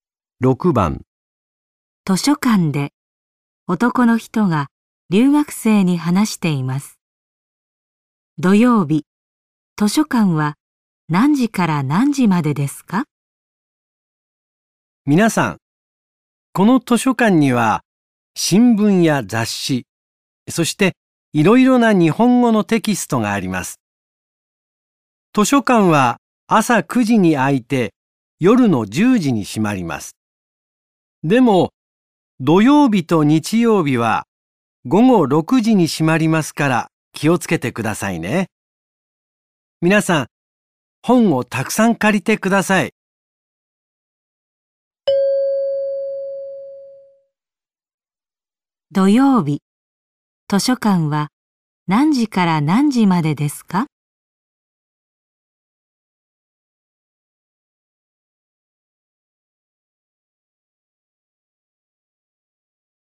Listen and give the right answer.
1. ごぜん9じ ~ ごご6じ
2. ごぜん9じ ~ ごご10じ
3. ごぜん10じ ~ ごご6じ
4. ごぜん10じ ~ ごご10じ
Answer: 1. ごぜん9じ ~ ごご6じ

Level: N5 Listening · Test 3